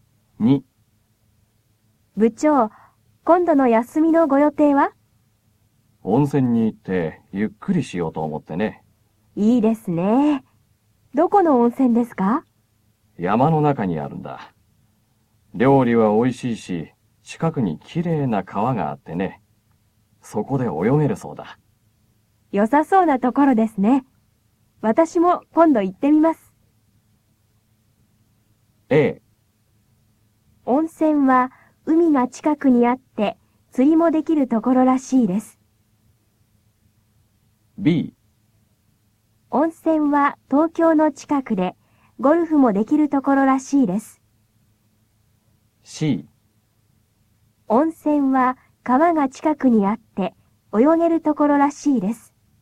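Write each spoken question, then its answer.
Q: 温泉は川が近くにあって泳げるところらしいです。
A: C: 温泉は川が近くにあって泳げるところらしいです。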